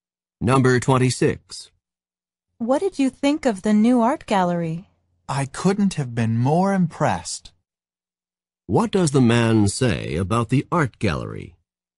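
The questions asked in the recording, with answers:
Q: What does the man say about the art gallery?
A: He was very impressed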